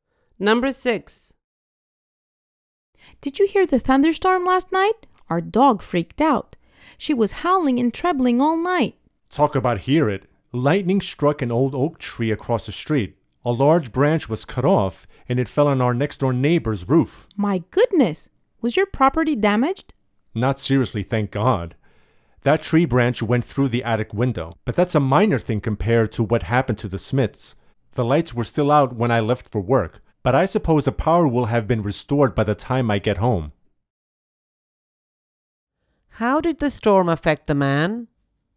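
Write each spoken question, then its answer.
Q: How did the storm affect the man?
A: A tree branch broke his attic window and his power went out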